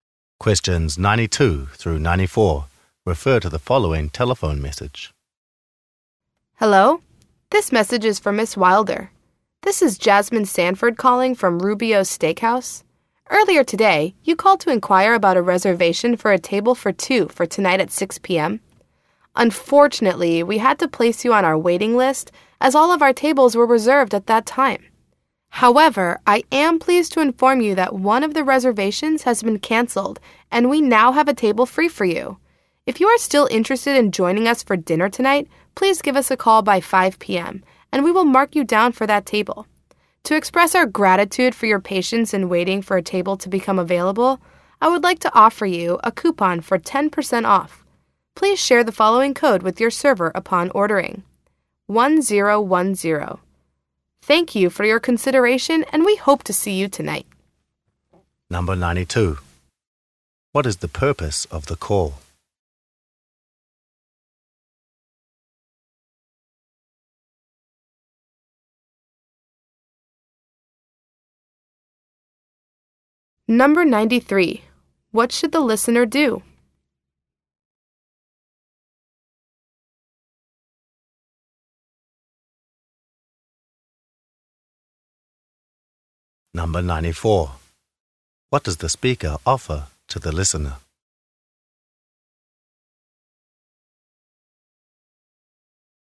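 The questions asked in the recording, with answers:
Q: What is the purpose of the call?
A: To say a table has become available

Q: What should the listener do?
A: Call back by 5 p.m.

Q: What does the speaker offer to the listener?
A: A 10% off coupon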